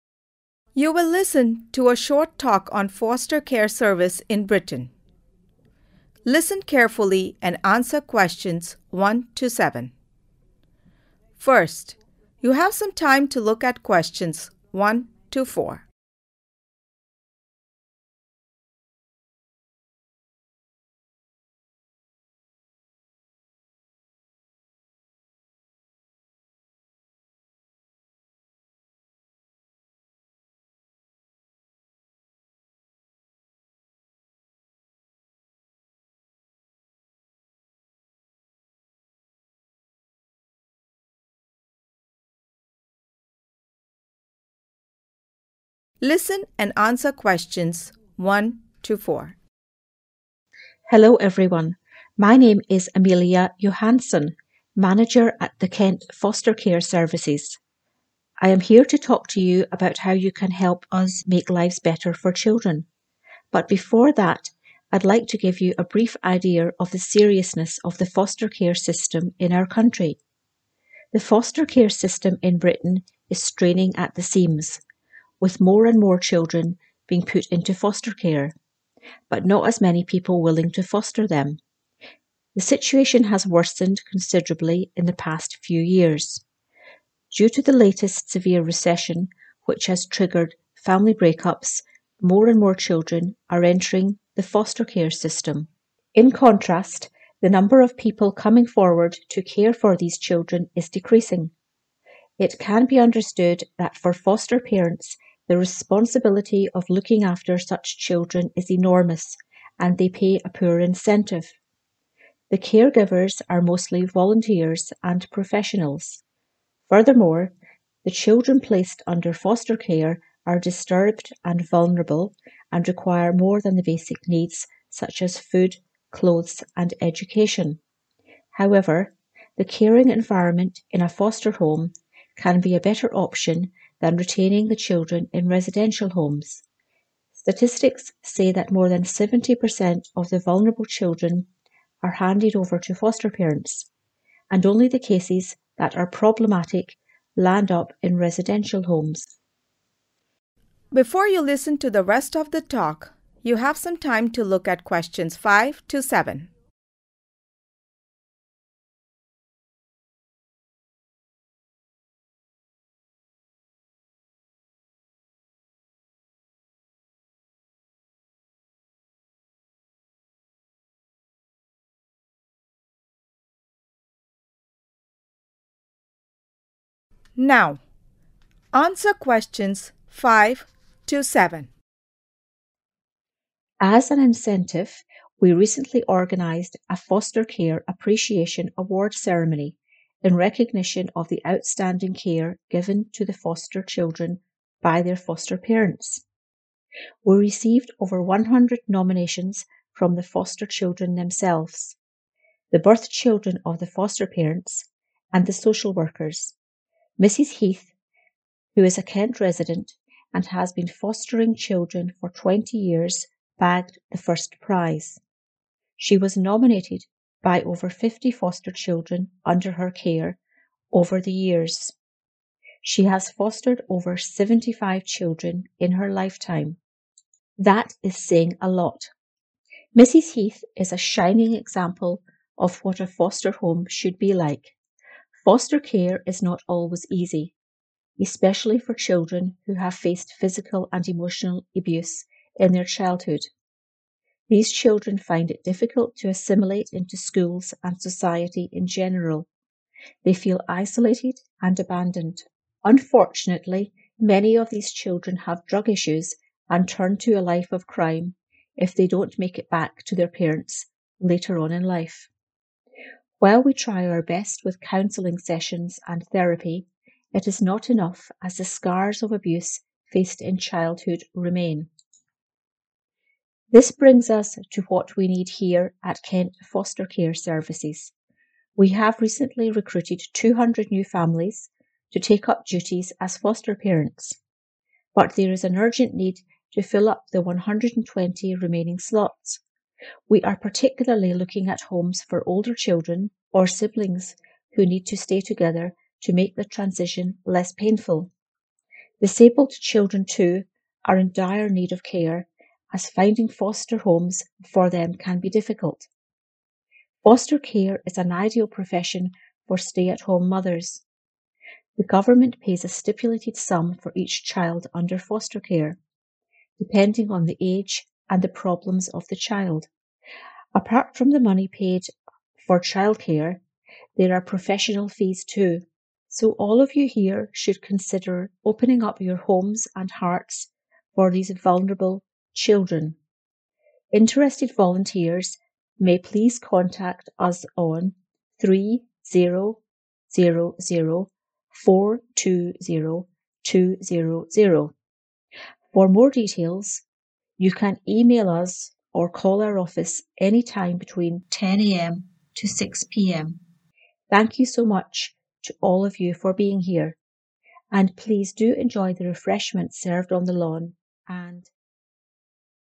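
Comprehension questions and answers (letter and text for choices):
Choose the correct letter, A, B or C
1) The Britain foster care system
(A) has fewer children now.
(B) lacks funding due to recession.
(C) is under pressure.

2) The number of people volunteering for foster care is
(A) decreasing.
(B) enormous.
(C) moderate.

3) Amelia says that the children under foster care require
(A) only food, clothes and education.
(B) more than the basic needs.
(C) more basic needs.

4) Residential homes are more suitable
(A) than foster homes.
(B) for a few children.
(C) for 70% of the children.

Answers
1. (C) is under pressure.
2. (A) decreasing.
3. (B) more than the basic needs.
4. (B) for a few children.

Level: Beginner's Lessons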